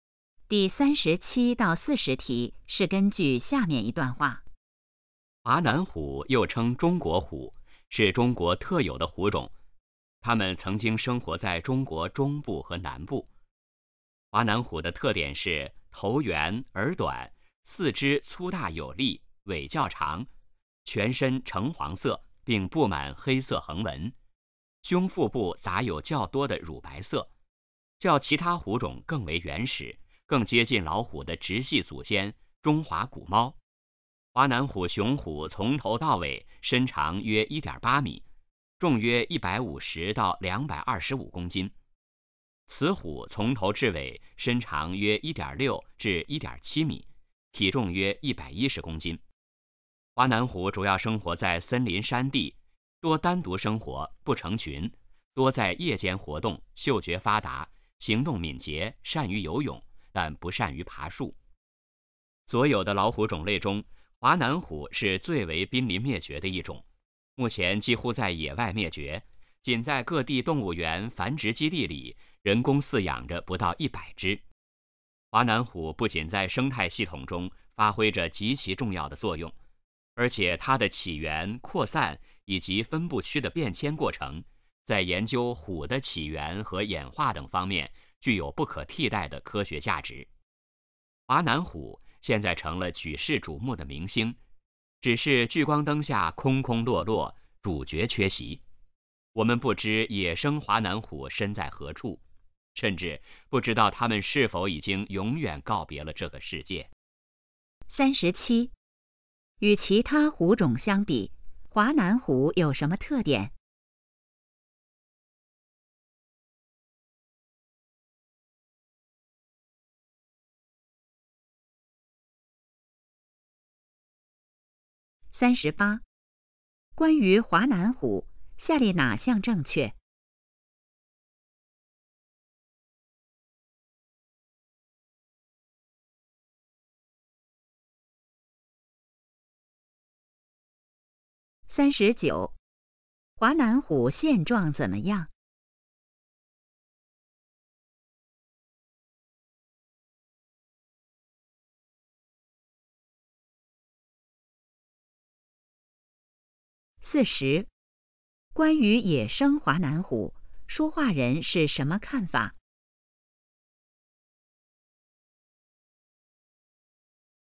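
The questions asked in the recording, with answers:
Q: 与其他虎种相比,华南虎有什么特点?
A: 更原始,更接近老虎的直系祖先

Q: 华南虎现状怎么样?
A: 野外几乎灭绝,人工饲养不到100只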